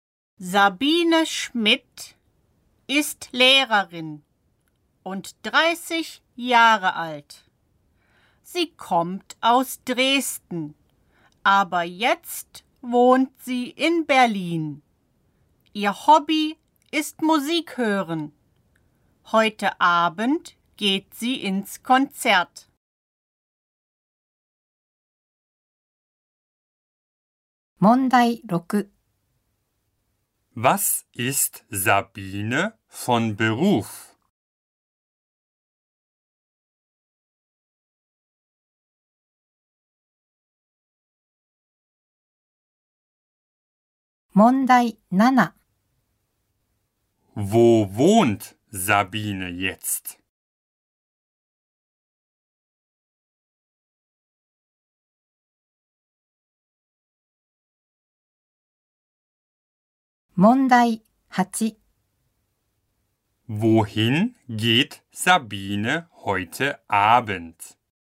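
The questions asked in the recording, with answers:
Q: Was ist Sabine von Beruf?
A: Lehrerin

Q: Wo wohnt Sabine jetzt?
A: In Berlin

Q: Wohin geht Sabine heute Abend?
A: Ins Konzert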